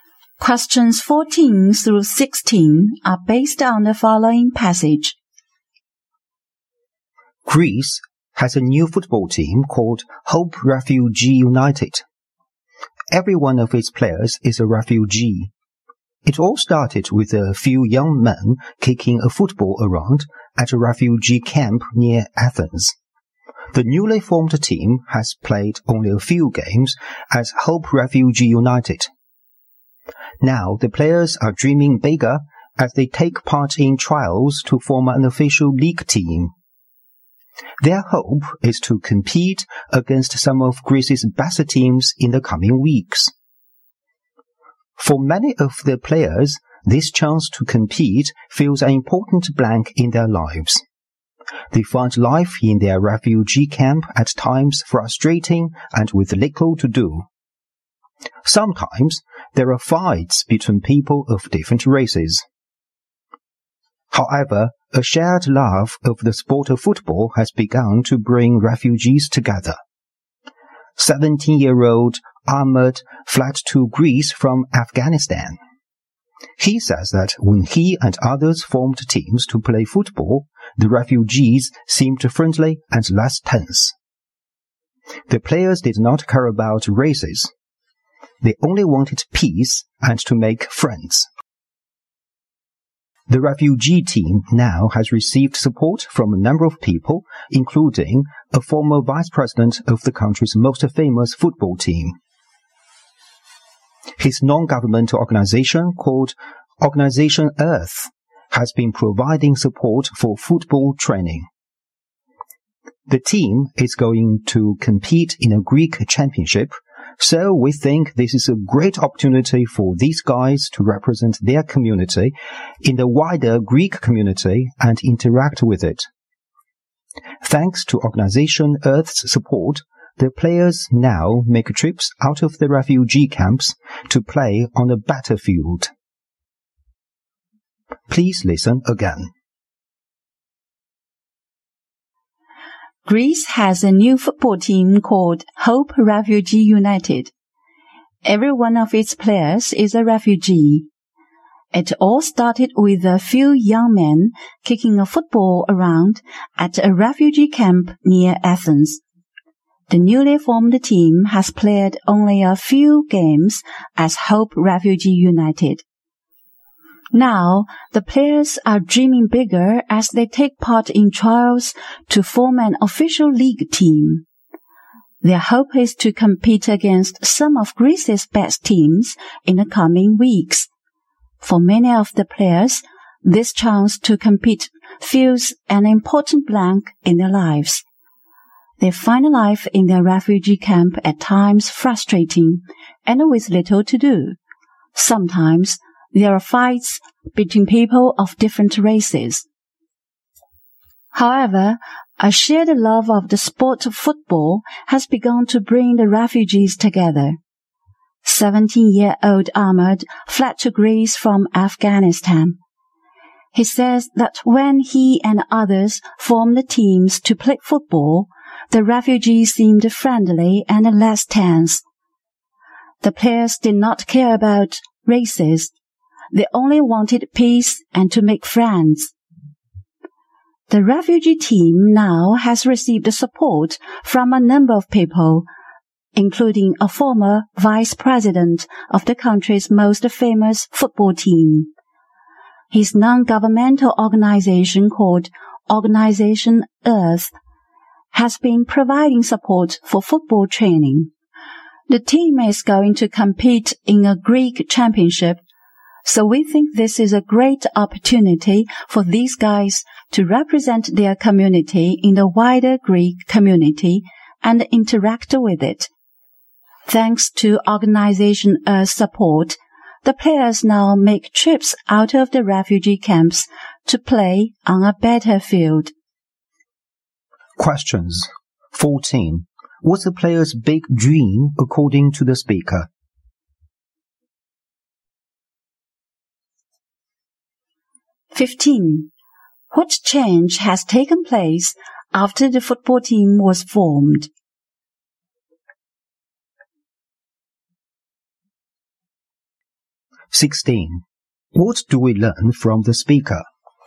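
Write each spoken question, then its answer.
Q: What's the player's big dream according to the speaker?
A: To form an official league team and compete against Greece's best teams.

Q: What change has taken place after the football team was formed?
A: The refugees became friendlier and less tense.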